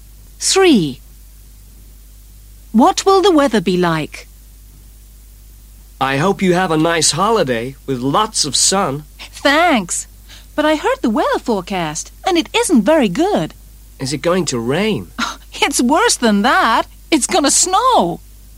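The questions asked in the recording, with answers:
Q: What will the weather be like?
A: It's going to snow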